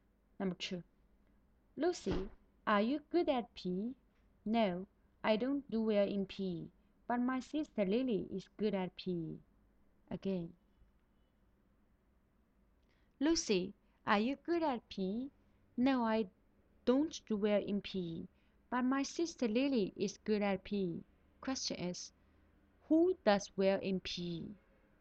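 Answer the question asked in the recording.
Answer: Lily, Lucy's sister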